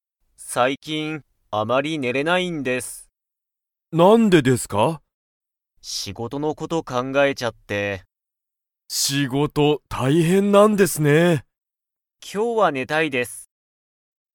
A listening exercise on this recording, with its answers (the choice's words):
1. 小林(こばやし)さんは、最近(さいきん)____。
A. もっと仕事(しごと)したい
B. ちょっと食(た)べたい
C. よく考(かんが)えない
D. あまり寝(ね)れない)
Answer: あまり寝(ね)れない)

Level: Level 1